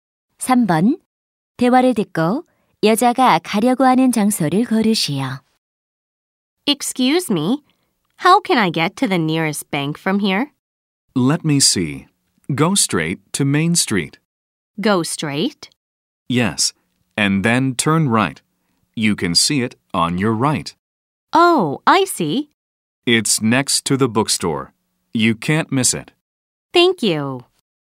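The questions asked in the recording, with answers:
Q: 대화를 듣고 여자가 가려고 하는 장소를 고르시오.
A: 은행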